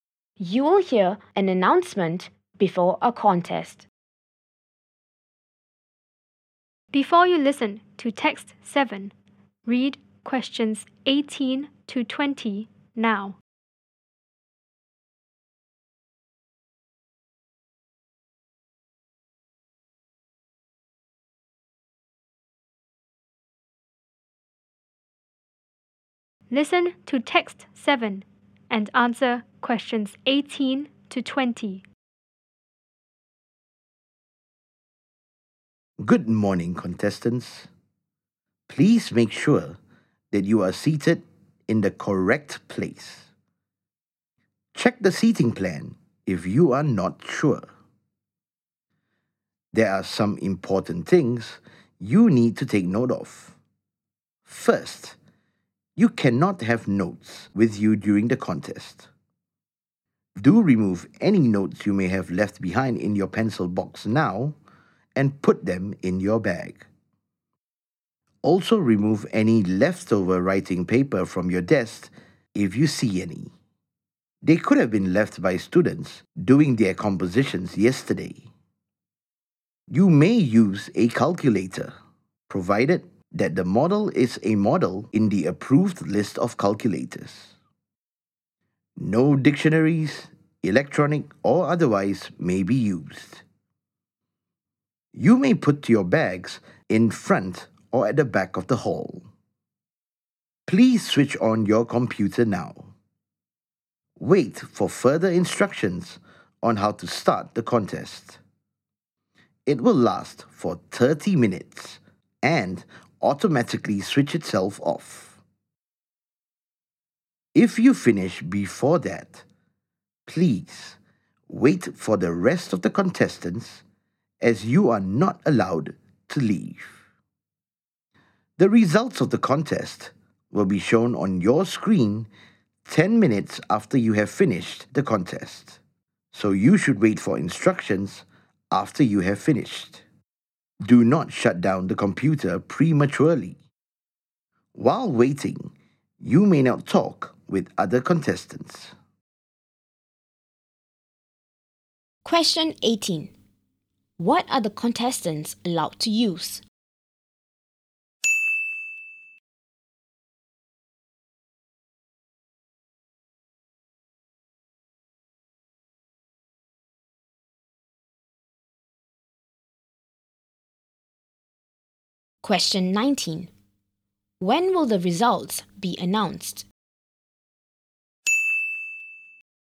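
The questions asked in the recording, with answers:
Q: What are the contestants allowed to use?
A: A calculator from the approved list

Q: When will the results be announced?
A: 10 minutes after they finish the contest, on their screens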